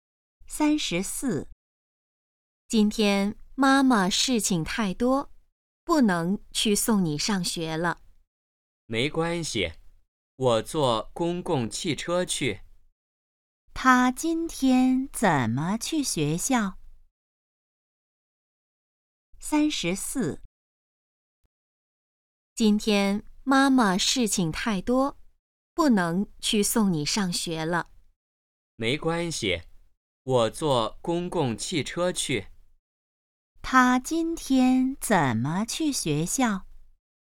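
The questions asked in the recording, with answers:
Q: 她今天怎么去学校?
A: 坐公共汽车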